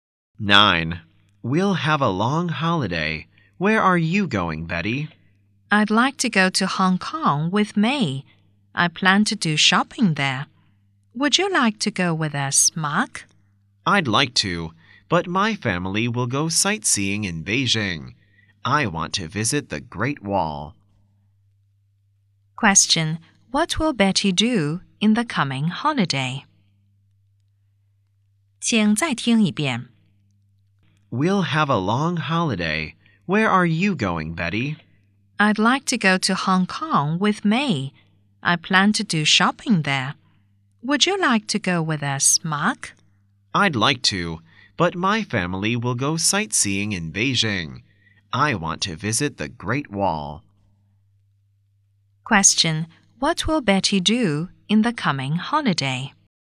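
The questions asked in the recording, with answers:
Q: What will Betty do in the coming holiday?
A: Go shopping in Hong Kong with May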